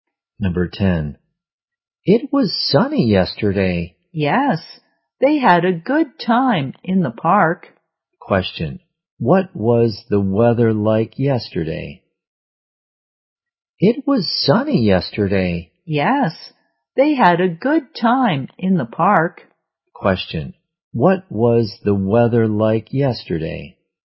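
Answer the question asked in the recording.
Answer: Sunny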